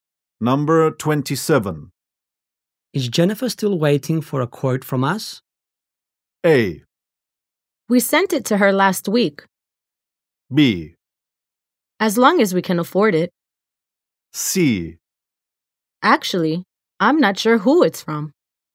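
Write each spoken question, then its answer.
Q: Is Jennifer still waiting for a quote from us?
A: A: We sent it to her last week.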